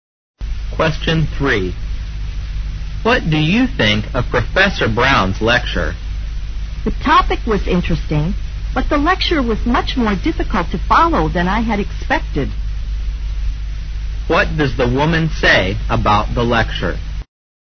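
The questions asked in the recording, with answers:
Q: What does the woman say about the lecture?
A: It was much harder to follow than she had expected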